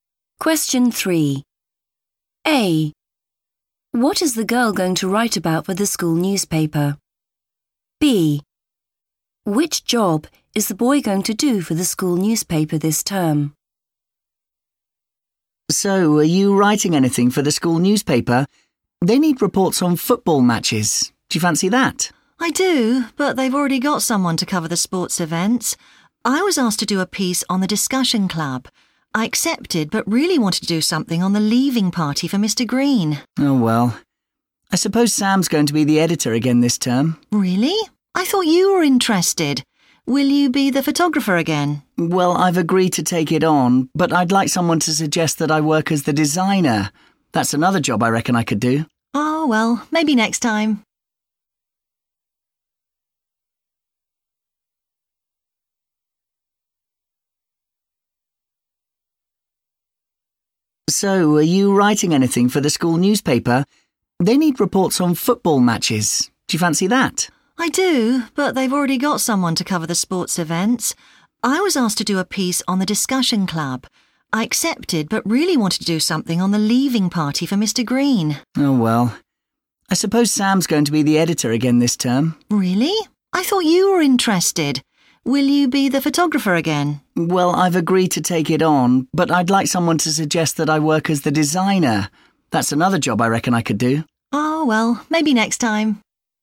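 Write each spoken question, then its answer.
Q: What is the girl going to write about for the school newspaper?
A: the discussion club

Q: Which job is the boy going to do for the school newspaper this term?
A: photographer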